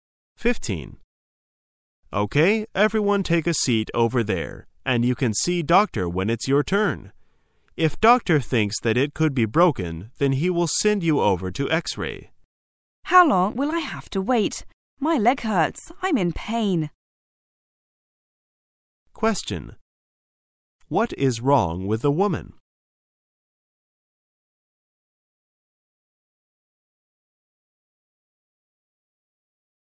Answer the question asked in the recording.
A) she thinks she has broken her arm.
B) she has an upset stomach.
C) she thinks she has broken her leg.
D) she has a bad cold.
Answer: C) she thinks she has broken her leg.

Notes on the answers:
此题考查听细节的能力。解题关键是听到"she has broken her leg",与原文"my leg hurt"相对应,注意这里的leg用的是单数形式,说明是一条腿受伤。

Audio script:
Everyone take a seat over there and you can see doctor when it's your turn. If doctor thinks that it could be broken then he will send you over to X-ray. W: How long will I have to wait? My leg hurts! I'm in pain! Q: What is wrong with the woman?